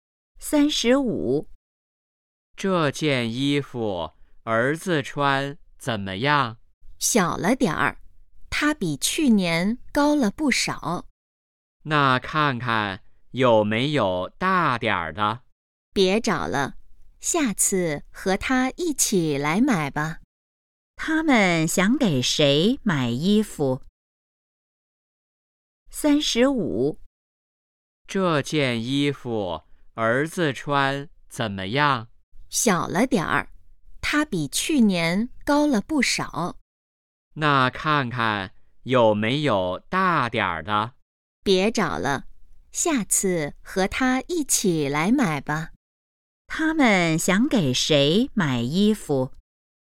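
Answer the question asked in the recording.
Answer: 儿子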